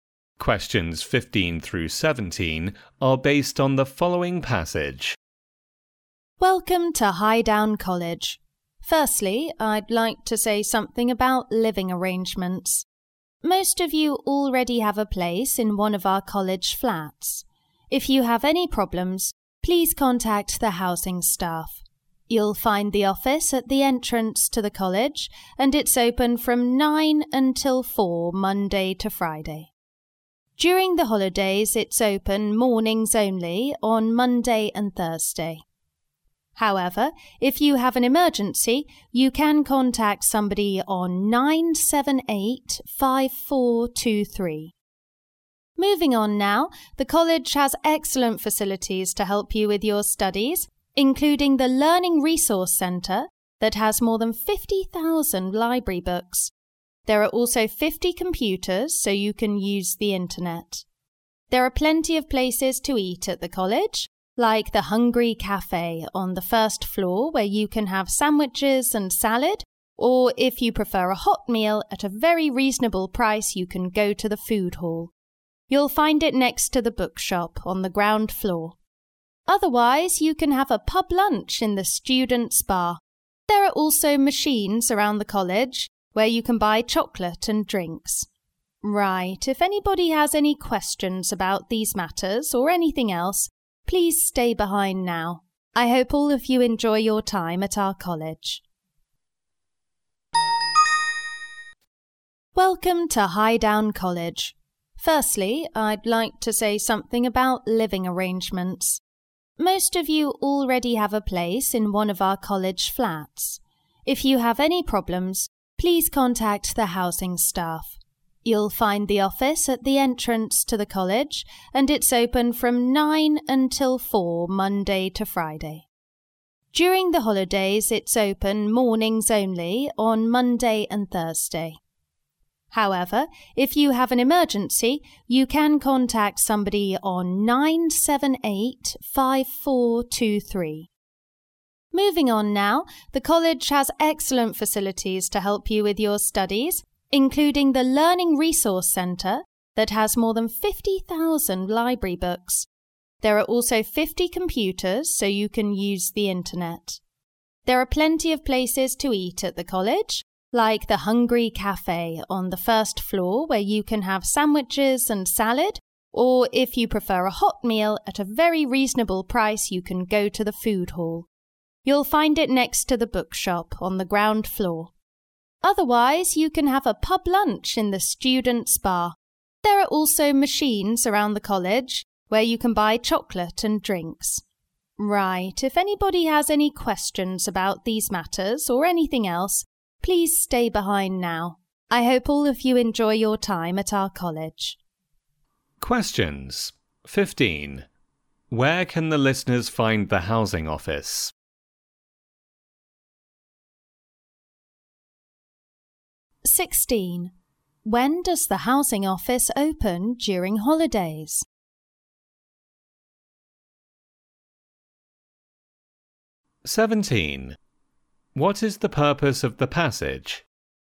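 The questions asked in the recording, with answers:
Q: Where can the listeners find the housing office?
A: At the entrance to the college

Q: When does the housing office open during holidays?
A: Monday and Thursday mornings

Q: What is the purpose of the passage?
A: To introduce the college to new students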